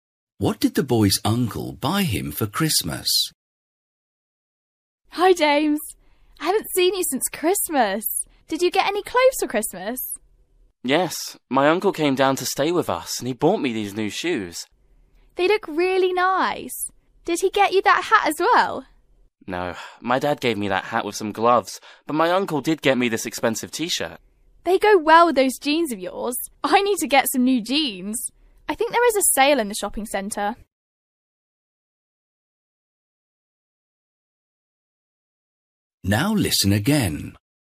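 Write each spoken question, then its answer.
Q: What did the boy's uncle buy him for Christmas?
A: New shoes and an expensive T-shirt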